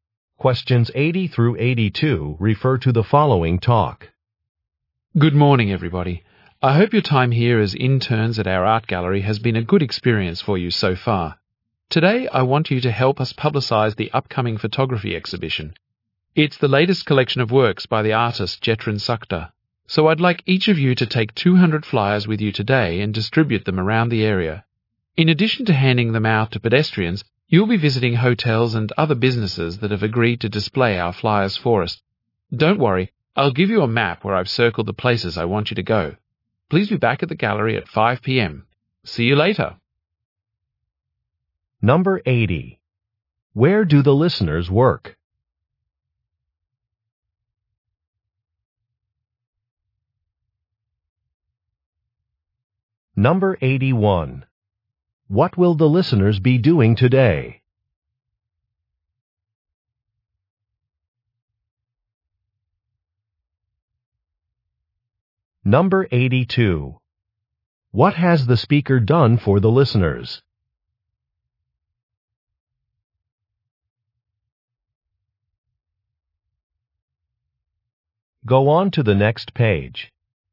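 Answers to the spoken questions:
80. At an art gallery
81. Handing out flyers for an exhibition
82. Marked places on a map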